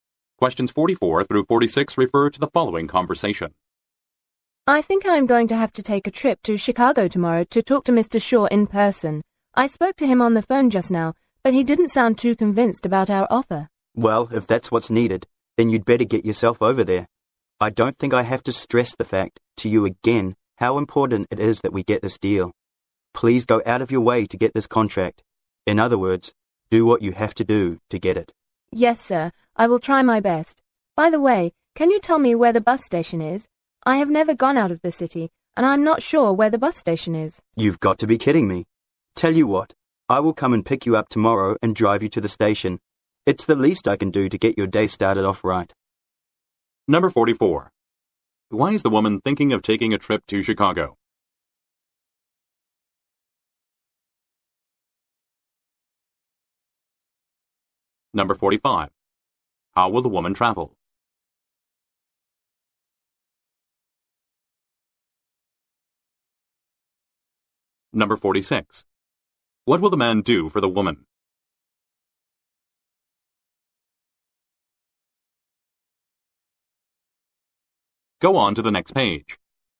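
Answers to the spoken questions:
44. To talk to Mr. Shaw in person and get the contract
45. By bus
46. Pick her up and drive her to the bus station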